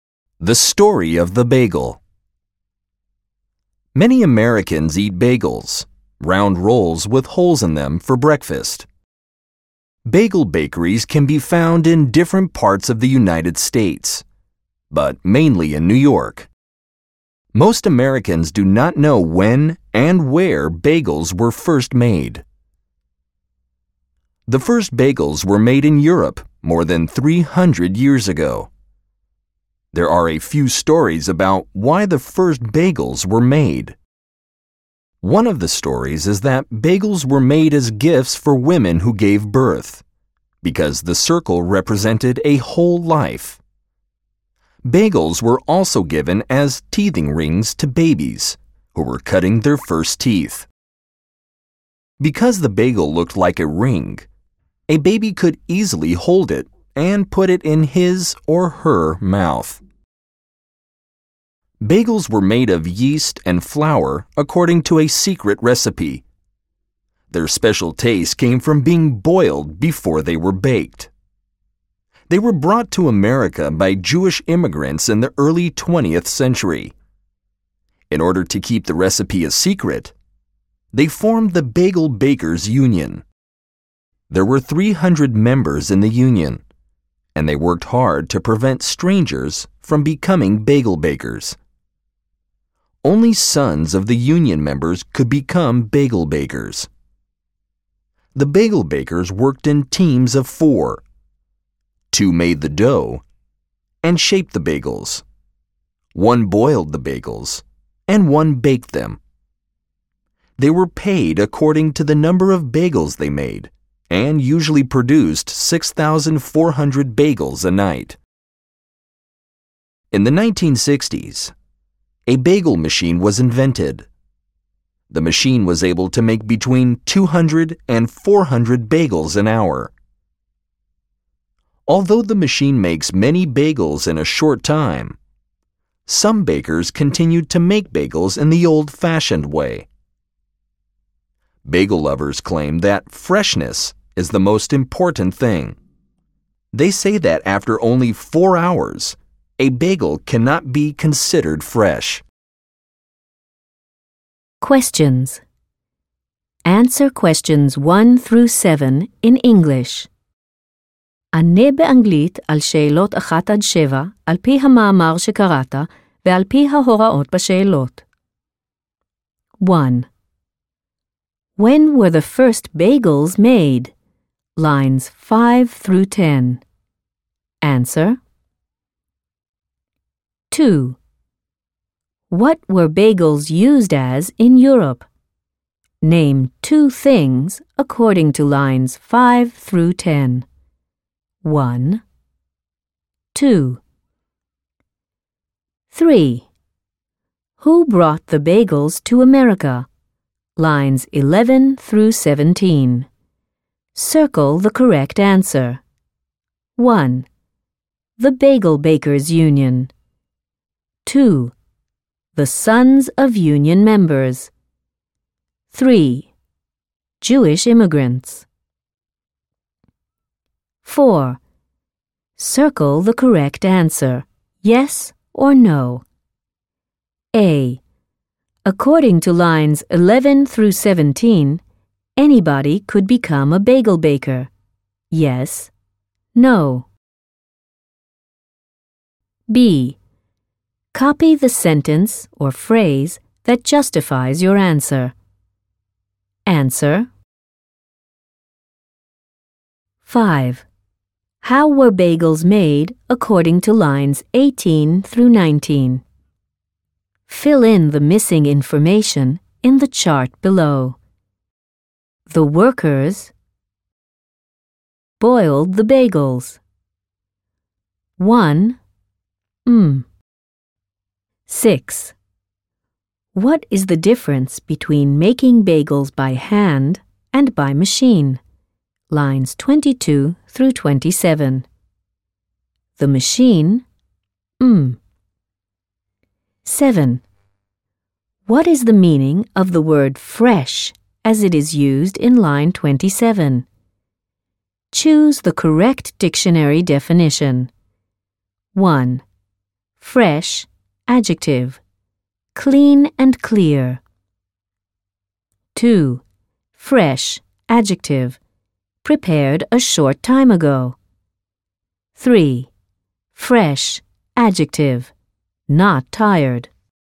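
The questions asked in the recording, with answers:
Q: When were the first bagels made?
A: More than 300 years ago

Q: What were bagels used as in Europe?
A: Gifts for women who gave birth, and teething rings for babies

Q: Who brought the bagels to America?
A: 3: Jewish immigrants

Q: According to lines 11 through 17, anybody could become a bagel baker.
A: No

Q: What is the meaning of the word fresh as it is used in line 27?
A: 2: Prepared a short time ago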